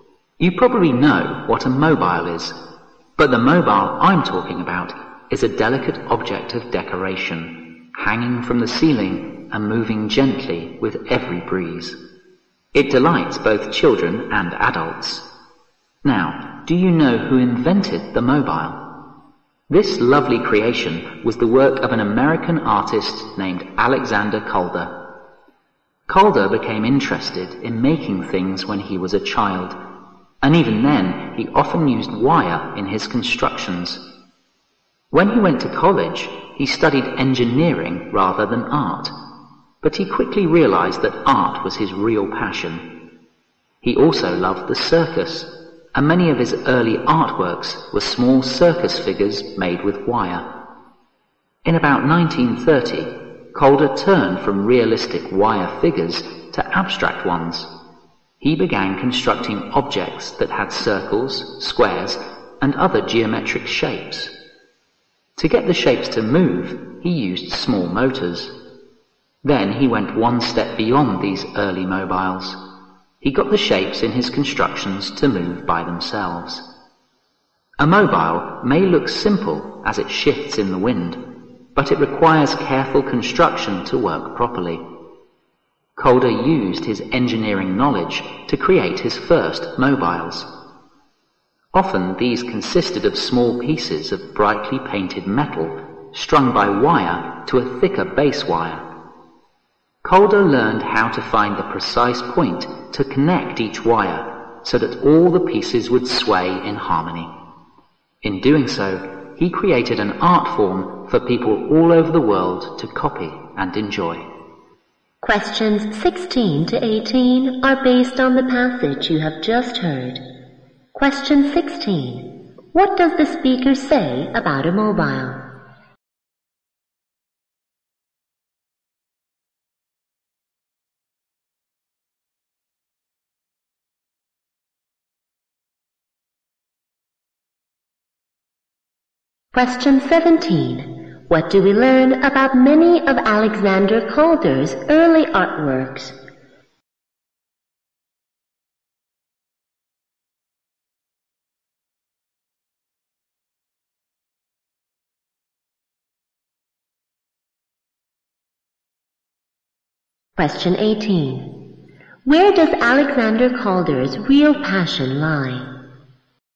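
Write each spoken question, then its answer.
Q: What does the speaker say about a mobile?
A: It is a delicate decoration hanging from the ceiling that moves with every breeze and delights children and adults.

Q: What do we learn about many of Alexander Calder's early artworks?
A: They were small circus figures made with wire.

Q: Where does Alexander Calder's real passion lie?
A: In art.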